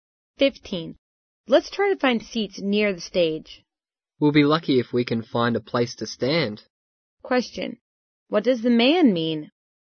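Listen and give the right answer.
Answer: It will be so crowded that getting seats is unlikely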